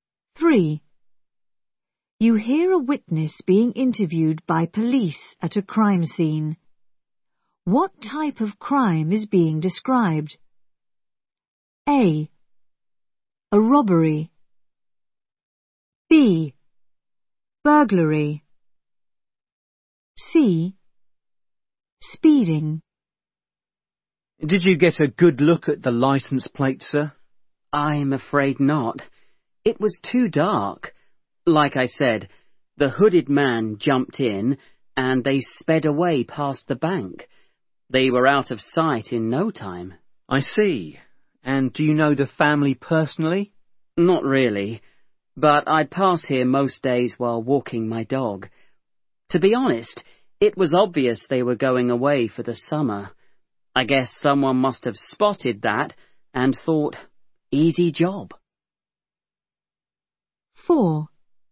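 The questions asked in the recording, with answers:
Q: What type of crime is being described?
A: B: Burglary.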